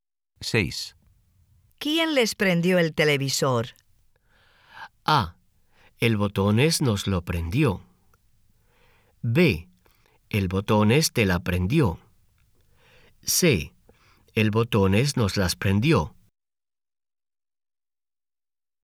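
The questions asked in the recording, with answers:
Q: ¿Quién les prendió el televisor?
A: A: El Botones nos lo prendió.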